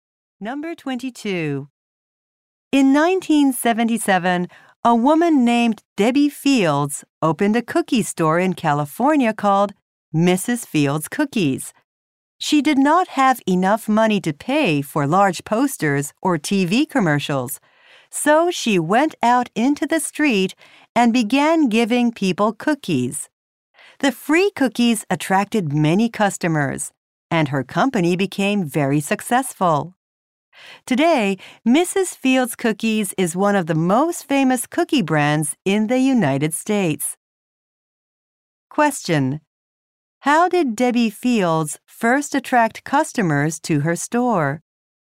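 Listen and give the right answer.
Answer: By giving free cookies to people in the street.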